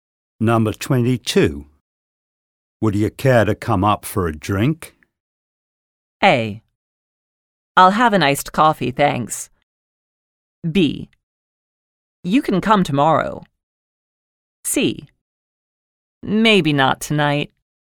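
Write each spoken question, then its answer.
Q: Would you care to come up for a drink?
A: C: Maybe not tonight.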